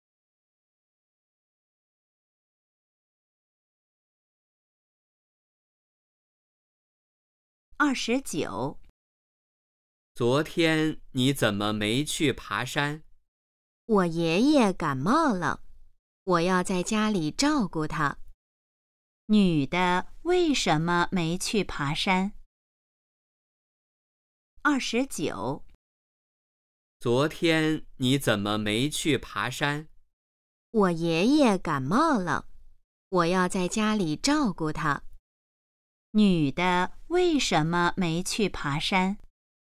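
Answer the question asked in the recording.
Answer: 爷爷感冒了,她要在家照顾他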